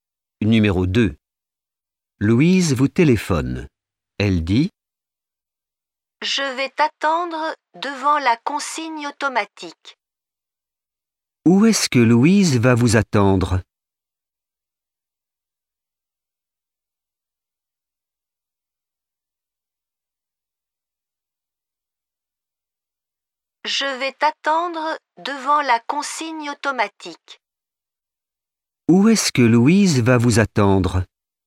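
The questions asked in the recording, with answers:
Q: Où est-ce que Louise va vous attendre ?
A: Devant la consigne automatique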